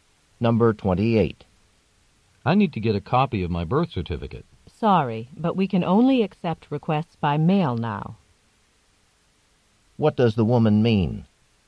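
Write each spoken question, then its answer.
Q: What does the woman mean?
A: He must send his request for the birth certificate by mail.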